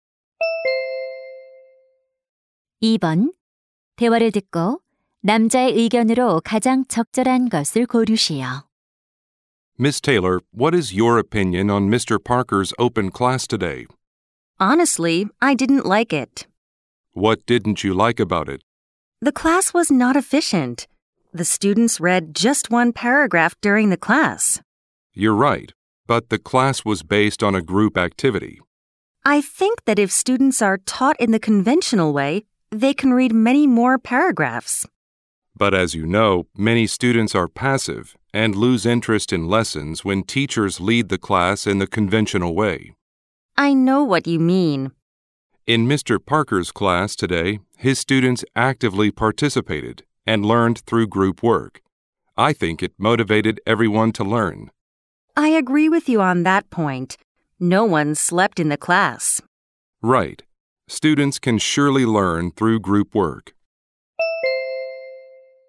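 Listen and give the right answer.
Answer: 학생들은 모둠 활동을 통해 배울 수 있다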